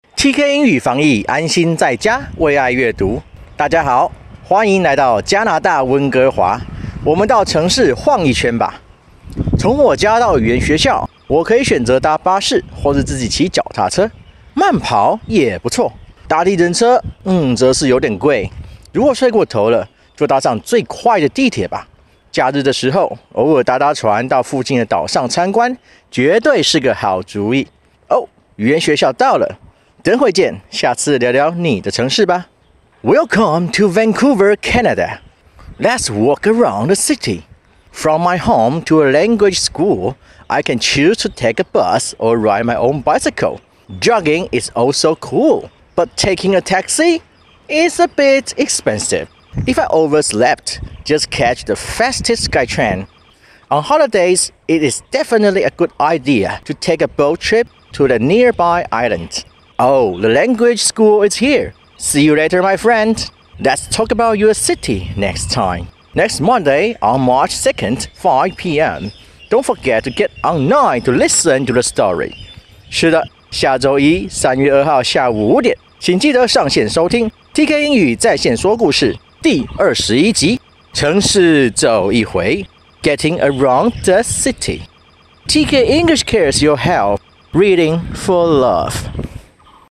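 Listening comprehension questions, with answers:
After the story, let's think about these questions.听完故事后,我们来思考一下这些问题:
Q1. Transportation is such an important thing to a city. Check the whole story; can you name five kinds of transportation that showed up? (交通对城市来说是如此重要。 再看一看整个故事,你能说出五種出现過的交通工具吗?)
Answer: bus, bicycle, taxi, SkyTrain, boat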